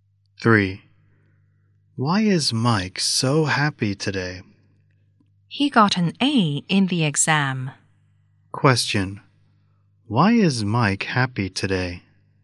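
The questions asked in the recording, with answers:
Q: Why is Mike happy today?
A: He got an A in the exam.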